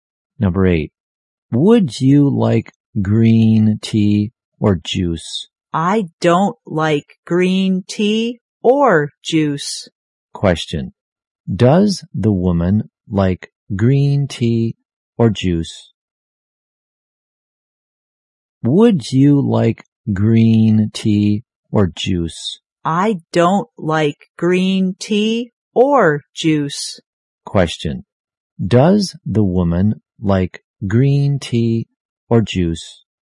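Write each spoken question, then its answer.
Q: does the woman like green tea or juice?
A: No, she doesn't like either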